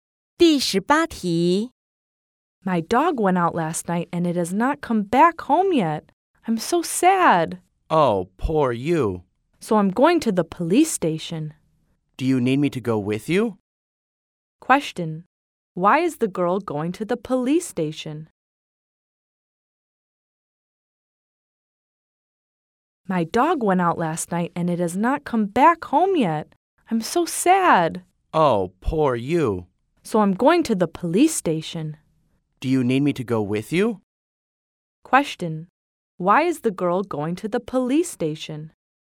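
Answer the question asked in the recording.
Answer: Her dog is lost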